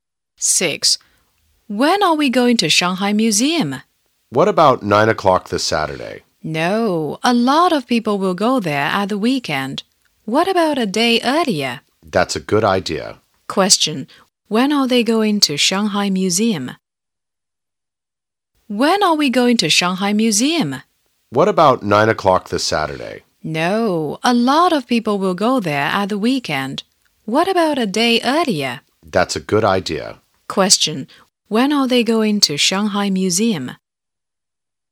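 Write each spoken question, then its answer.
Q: When are they going to Shanghai Museum?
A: At 9 o'clock this Friday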